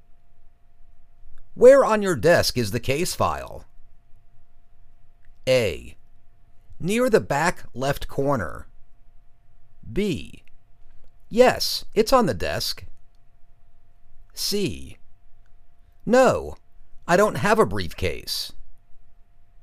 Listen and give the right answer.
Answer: Near the back left corner.